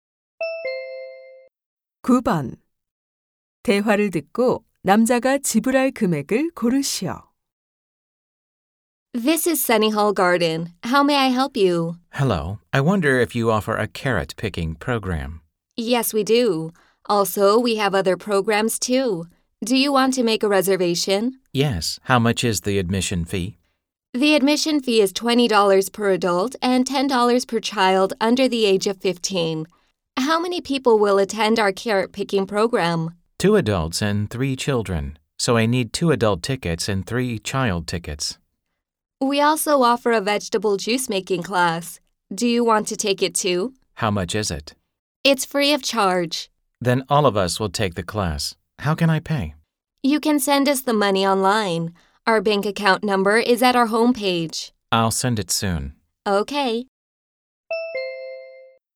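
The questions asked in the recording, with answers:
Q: 대화를 듣고 남자가 지불할 금액을 고르시오.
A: $70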